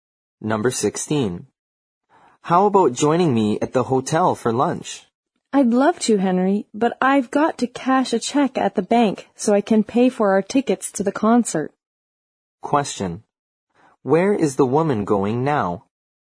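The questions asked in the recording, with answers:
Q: Where is the woman going now?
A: To the bank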